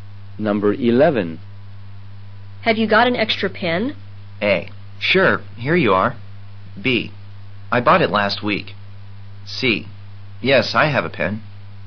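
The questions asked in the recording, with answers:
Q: Have you got an extra pen?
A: A: Sure, here you are.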